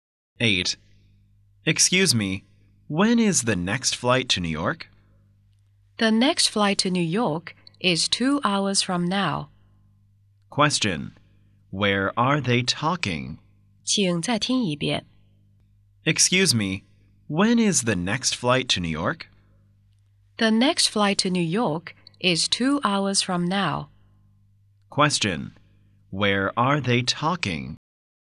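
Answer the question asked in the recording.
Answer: At the airport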